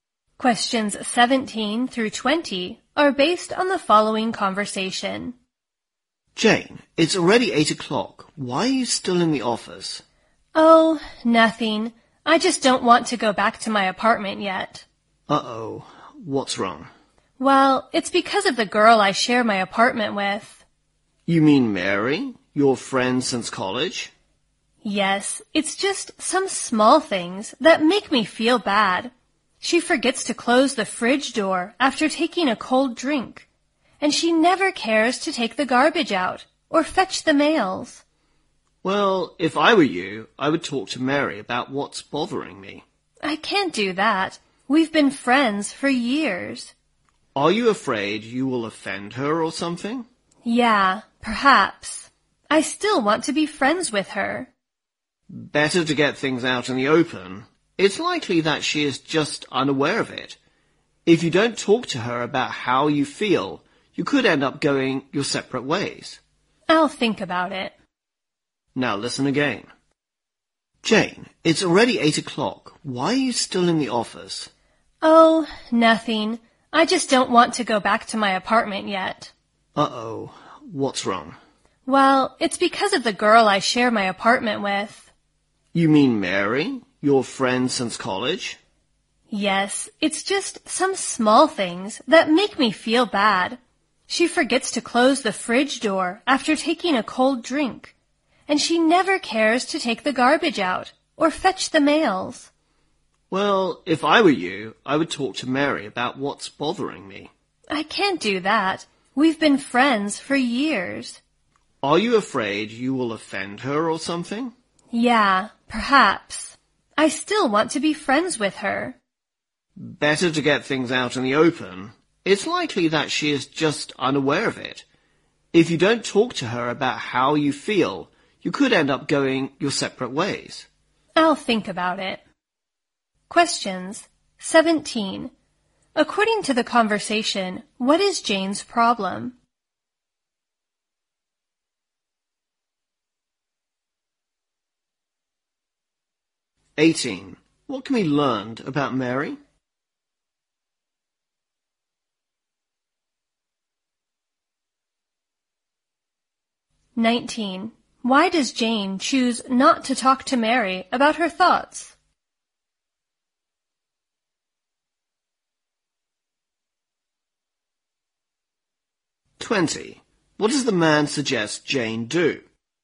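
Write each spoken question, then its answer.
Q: According to the conversation, what is Jane's problem?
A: Her roommate Mary does small things that bother her

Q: Why does Jane choose not to talk to Mary about her thoughts?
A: She is afraid of offending Mary and wants to stay friends

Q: What does the man suggest Jane do?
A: Talk openly with Mary about what bothers her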